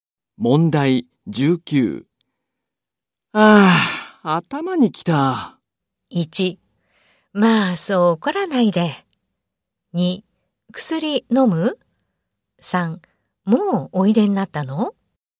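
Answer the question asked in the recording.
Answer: 1: まあそう怒らないで。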